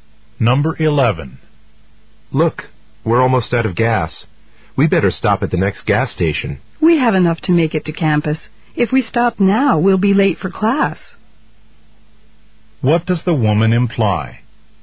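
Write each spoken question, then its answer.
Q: What does the woman imply?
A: They shouldn't stop for gas now.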